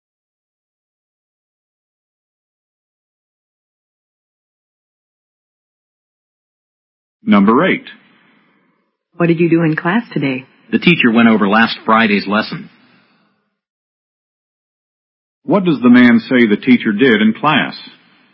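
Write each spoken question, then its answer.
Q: What does the man say the teacher did in class?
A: She reviewed last Friday's lesson.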